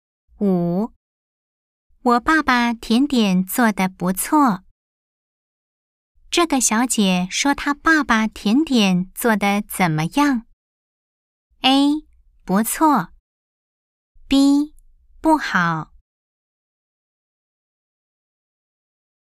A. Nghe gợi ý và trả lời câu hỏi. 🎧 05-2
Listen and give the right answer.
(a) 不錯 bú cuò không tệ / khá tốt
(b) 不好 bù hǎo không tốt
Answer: (a) 不錯 bú cuò không tệ / khá tốt